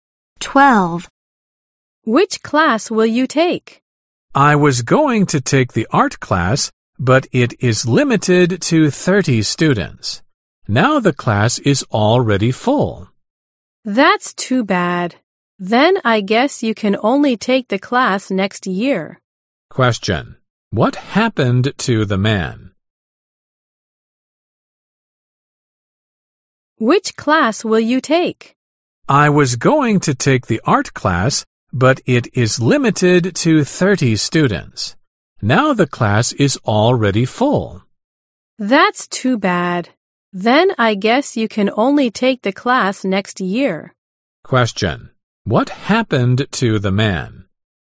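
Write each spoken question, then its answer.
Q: Question. What happened to the man?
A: He couldn't take the art class because it was already full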